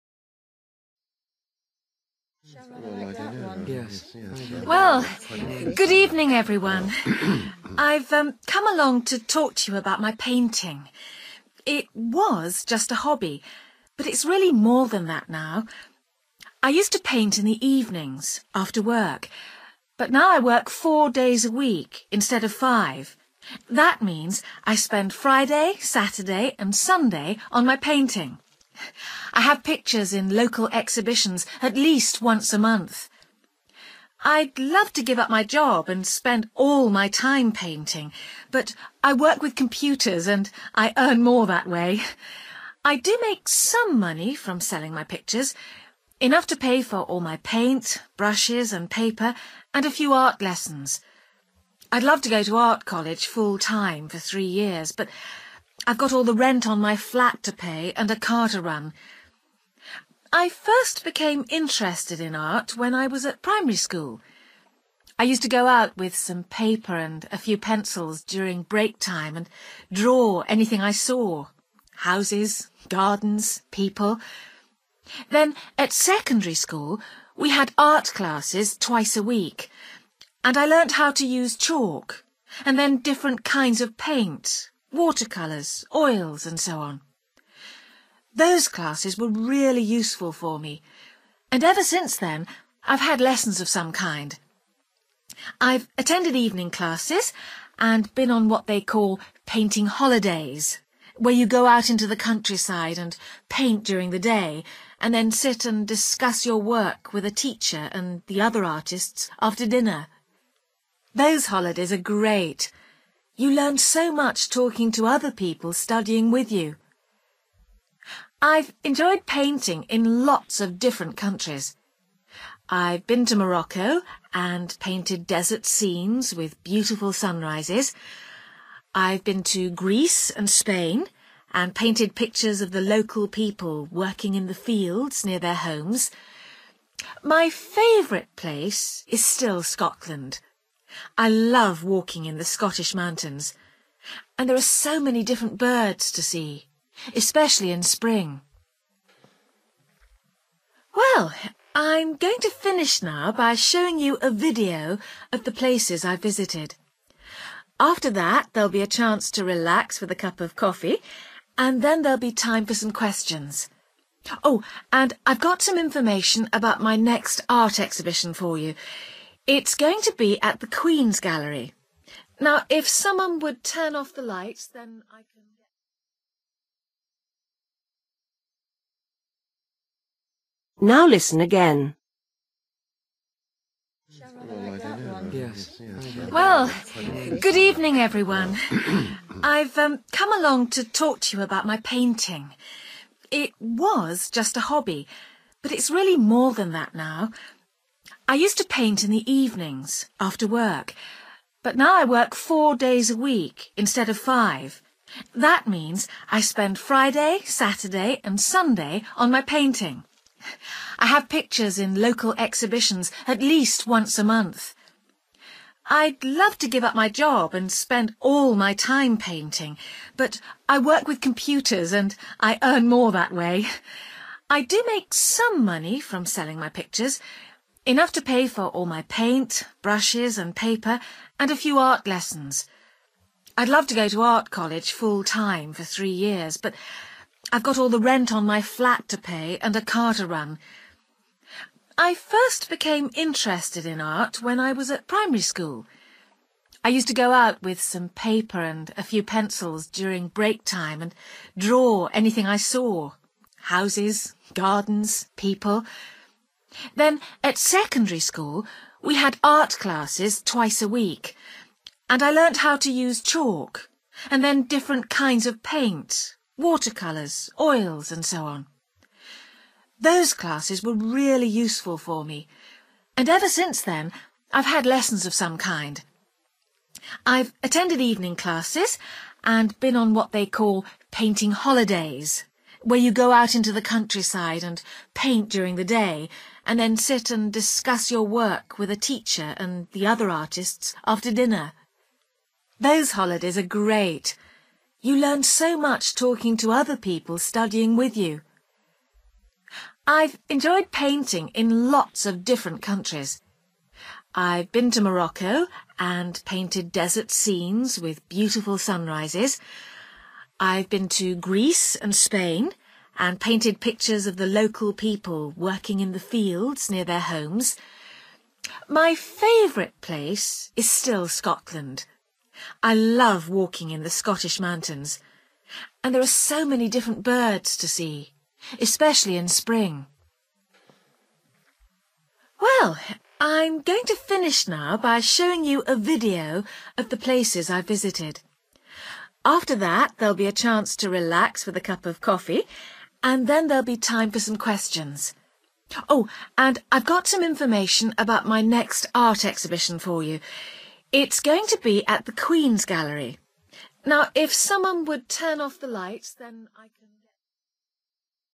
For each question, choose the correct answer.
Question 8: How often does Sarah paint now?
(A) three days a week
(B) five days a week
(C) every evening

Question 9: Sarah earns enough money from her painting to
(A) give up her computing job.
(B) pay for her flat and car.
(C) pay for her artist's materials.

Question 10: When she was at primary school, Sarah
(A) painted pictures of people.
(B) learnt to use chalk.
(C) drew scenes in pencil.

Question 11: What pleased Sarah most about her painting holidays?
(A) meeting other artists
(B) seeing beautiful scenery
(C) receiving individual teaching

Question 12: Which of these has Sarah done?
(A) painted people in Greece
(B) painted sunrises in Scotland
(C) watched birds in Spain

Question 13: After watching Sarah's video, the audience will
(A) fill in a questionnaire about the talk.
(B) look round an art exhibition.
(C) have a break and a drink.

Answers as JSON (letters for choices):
{"8": "A", "9": "C", "10": "C", "11": "A", "12": "A", "13": "C"}

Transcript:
Woman: Well, good evening everyone. I've come along to talk to you about my painting. It was just a hobby but it's really more than that now. I used to paint in the evenings after work, but now I work four days a week instead of five. That means I spend Friday, Saturday and Sunday on my painting. I have pictures in local exhibitions at least once a month.
I'd love to give up my job and spend all my time painting, but I work with computers and I earn more that way! I do make some money from selling my pictures, enough to pay for all my paint, brushes and paper and a few art lessons. I'd love to go to art college full-time for three years, but I've got all the rent on my flat to pay and a car to run.
I first became interested in art when I was at primary school. I used to go out with some paper and a few pencils during break time and draw anything I saw: houses, gardens, people. Then at secondary school we had art classes twice a week, and I learnt how to use chalk and then different kinds of paint: water colours, oils and so on.
Those classes were really useful for me, and ever since then I've had lessons of some kind. I've attended evening classes and been on what they call painting 'holidays', where you go out into the countryside and paint during the day and then sit and discuss your work with a teacher and the other artists after dinner. Those holidays are great; you learn so much talking to other people studying with you.
I've enjoyed painting in lots of different countries. I've been to Morocco and painted desert scenes with beautiful sunrises. I've been to Greece and Spain and painted pictures of the local people working in the fields near their homes. My favourite place is still Scotland. I love walking in the Scottish mountains, and there are so many different birds to see, especially in spring.
Well, I'm going to finish now by showing you a video of the places I've visited. After that there'll be a chance to relax with a cup of coffee and then there'll be time for some questions. Oh, and I've got some information about my next art exhibition for you. It's going to be at the Queen's Gallery. Now, if someone would turn off the lights ...

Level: B1